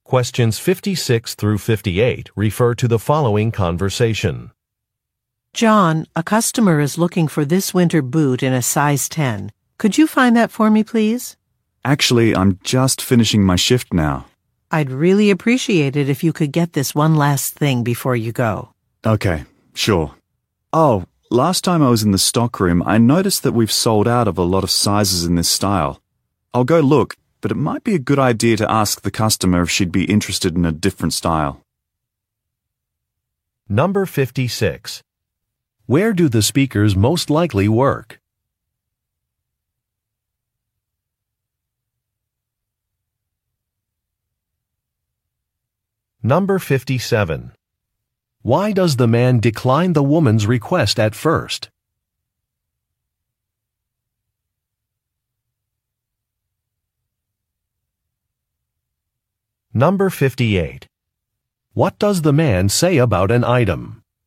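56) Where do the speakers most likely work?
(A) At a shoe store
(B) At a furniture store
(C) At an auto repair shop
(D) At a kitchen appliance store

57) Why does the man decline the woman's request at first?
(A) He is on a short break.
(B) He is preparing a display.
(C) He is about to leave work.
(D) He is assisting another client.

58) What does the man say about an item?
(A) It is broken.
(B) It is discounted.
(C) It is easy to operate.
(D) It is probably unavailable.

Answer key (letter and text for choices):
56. (A) At a shoe store
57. (C) He is about to leave work.
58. (D) It is probably unavailable.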